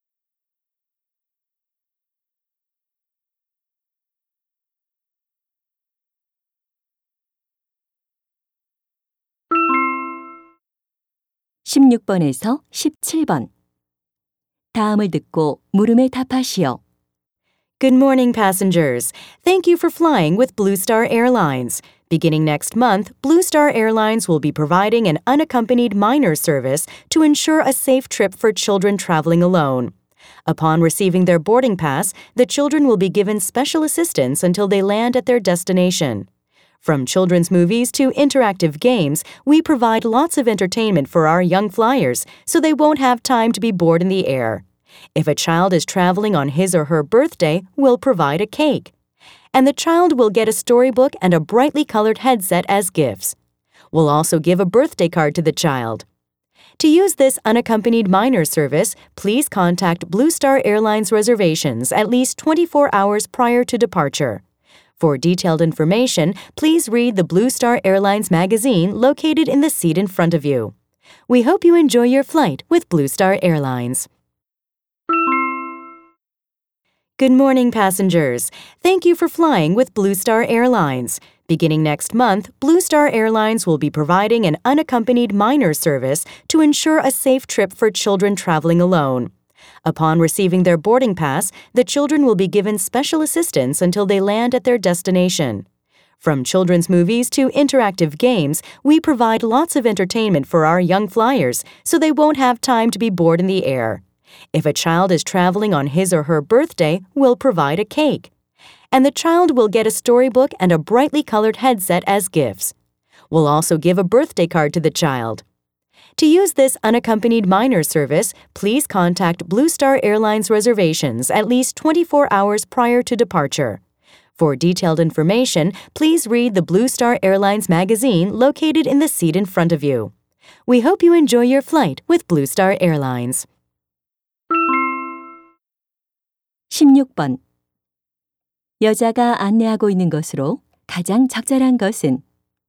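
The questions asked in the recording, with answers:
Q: 여자가 안내하고 있는 것으로 가장 적절한 것은?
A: 보호자 없이 여행하는 어린이를 위한 서비스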